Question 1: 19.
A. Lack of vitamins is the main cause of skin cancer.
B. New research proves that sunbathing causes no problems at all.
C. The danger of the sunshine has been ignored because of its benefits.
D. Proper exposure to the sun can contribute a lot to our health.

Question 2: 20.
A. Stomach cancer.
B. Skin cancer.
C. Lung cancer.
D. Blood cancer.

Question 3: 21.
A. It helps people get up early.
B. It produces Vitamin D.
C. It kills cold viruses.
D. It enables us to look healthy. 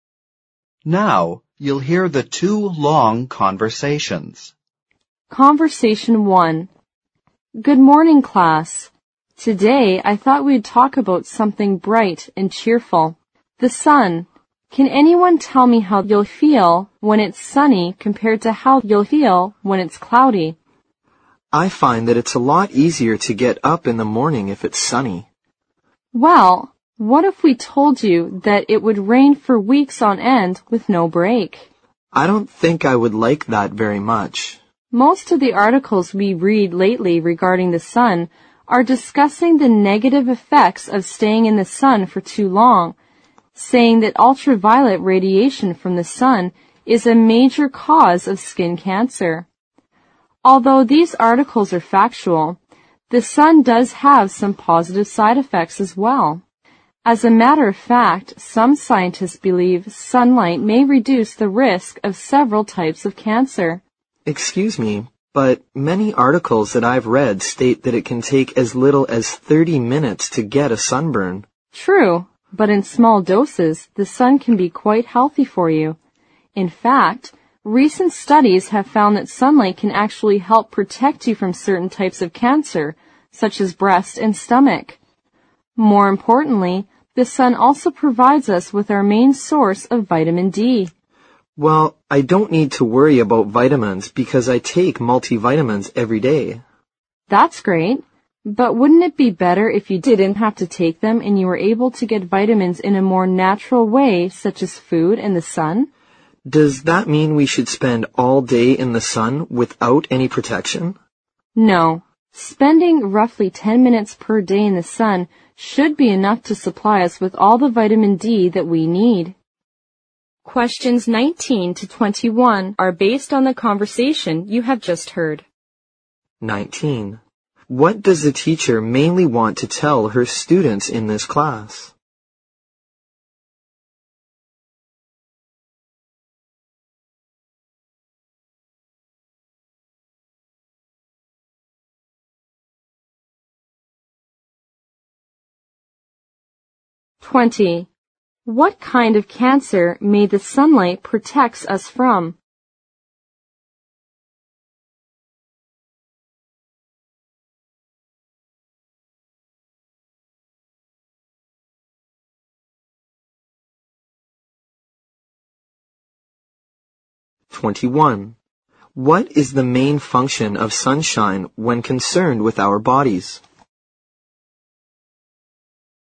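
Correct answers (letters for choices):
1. D
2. A
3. B

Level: 六级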